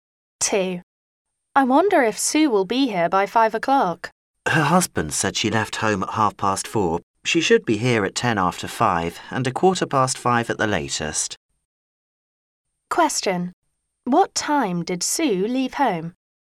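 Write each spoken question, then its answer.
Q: What time did Sue leave home?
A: At 4:30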